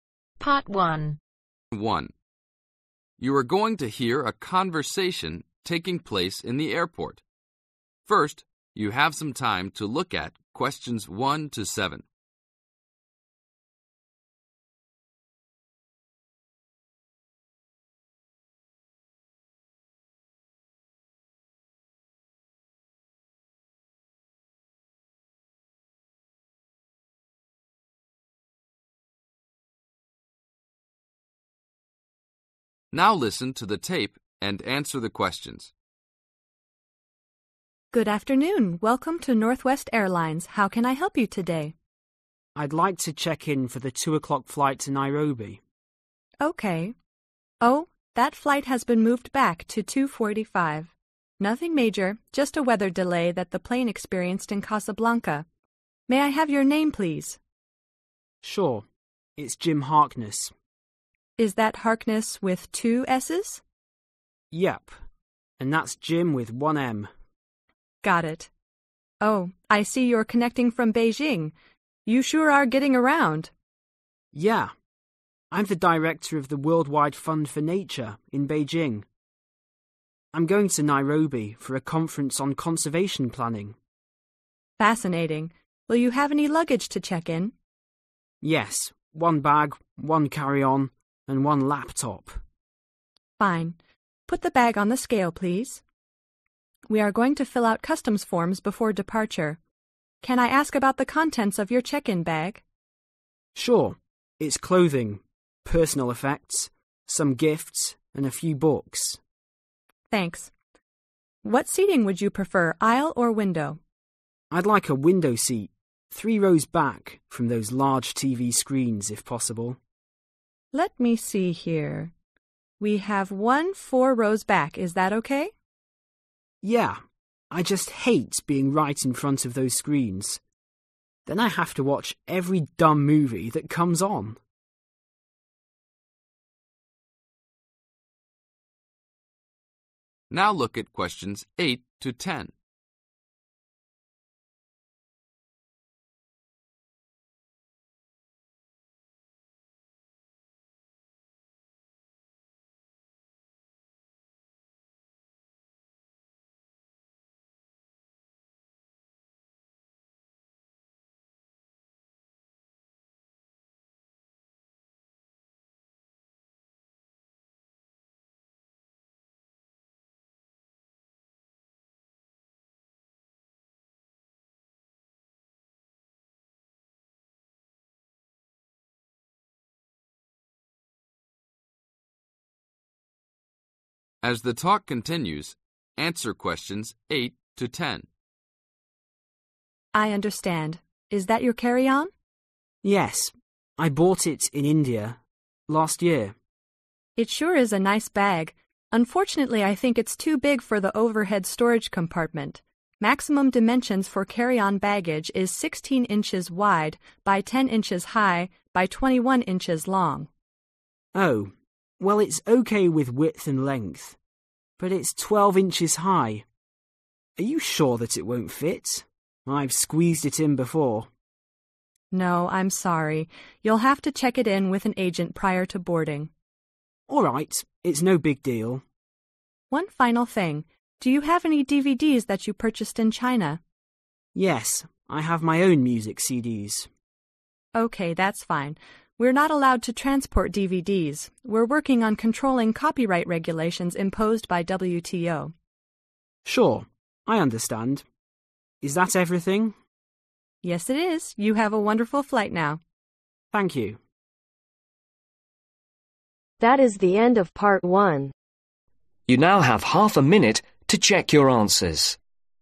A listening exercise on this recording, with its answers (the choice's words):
Complete the form below. Write ONE WORD ONLY for each answer.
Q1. Destination: (1)............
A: Nairobi

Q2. Name: (2)........... Harkness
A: Jim

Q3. Connection from: (3)...........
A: Beijing

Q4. Purpose of travel: (4)............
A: Conference

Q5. Personal (5)...........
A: Effects

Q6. Some (6)...........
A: Gifts

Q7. Few (7)...........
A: Books

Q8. Which of the following is too large for the passenger's carry-on ?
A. length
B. weight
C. height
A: height

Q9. What must the passenger do with the carry-on ?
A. leave in the airport.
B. give it to an argent before boarding.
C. remove enough contents to reduce the weight.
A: give it to an argent before boarding.

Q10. What items are not allowed out of China ?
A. CDs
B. DVDs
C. VCDs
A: DVDs